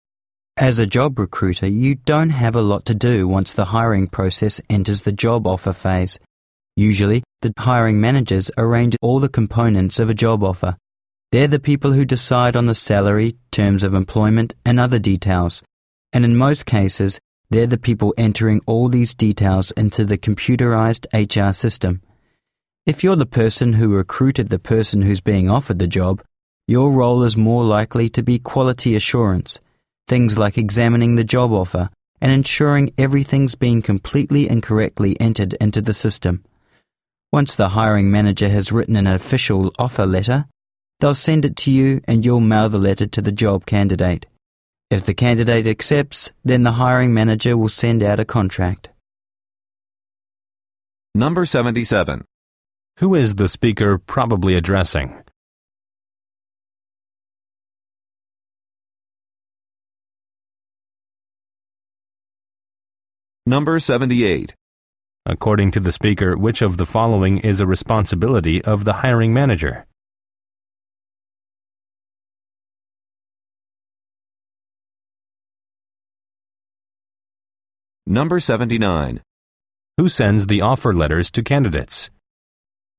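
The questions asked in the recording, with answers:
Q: Who is the speaker probably addressing?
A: Job recruiters

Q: According to the speaker, which of the following is a responsibility of the hiring manager?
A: Deciding on the salary and terms of employment

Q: Who sends the offer letters to candidates?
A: The recruiter (the listener)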